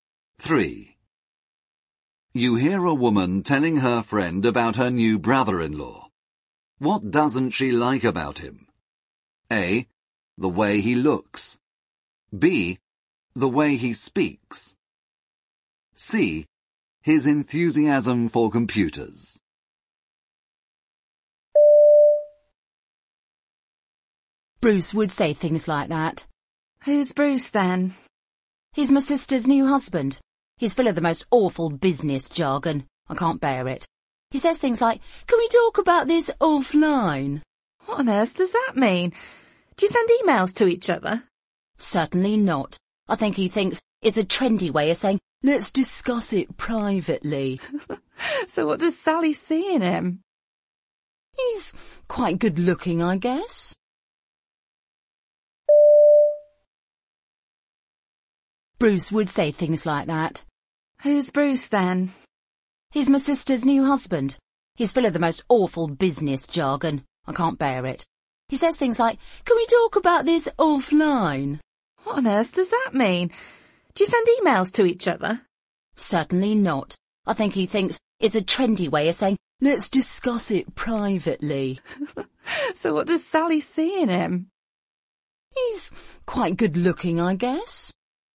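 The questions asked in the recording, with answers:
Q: What doesn't she like about him?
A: B: The way he speaks.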